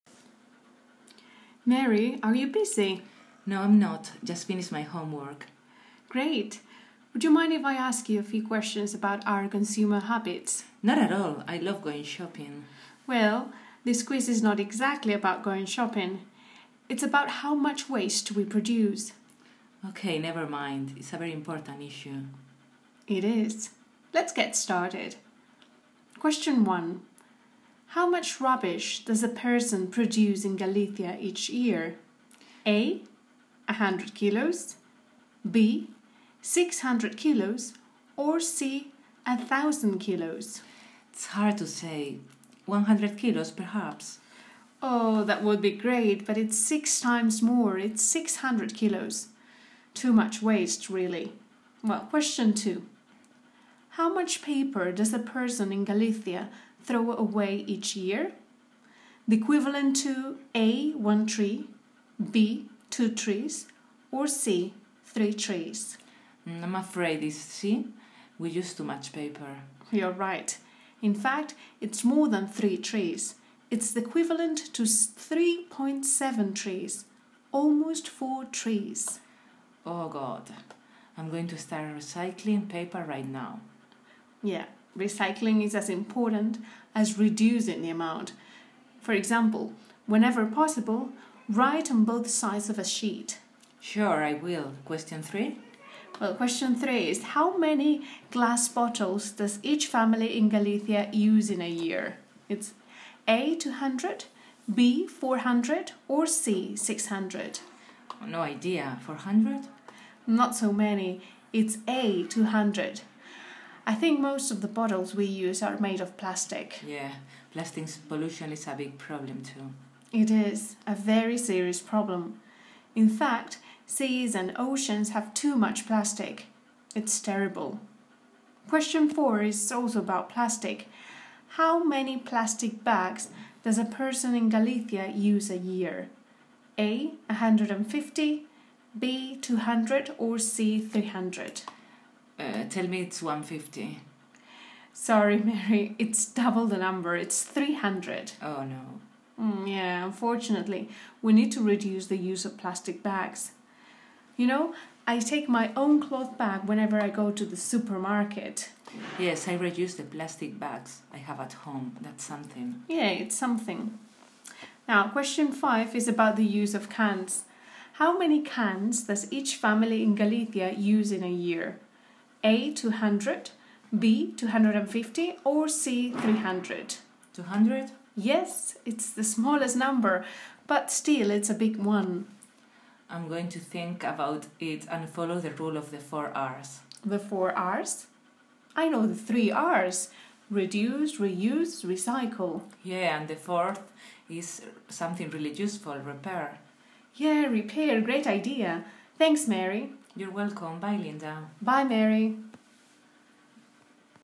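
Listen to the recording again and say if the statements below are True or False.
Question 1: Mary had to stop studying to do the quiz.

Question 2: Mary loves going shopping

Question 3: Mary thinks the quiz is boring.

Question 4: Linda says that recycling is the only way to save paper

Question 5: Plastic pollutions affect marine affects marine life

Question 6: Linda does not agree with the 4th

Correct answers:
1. False
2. True
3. False
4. False
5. True
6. False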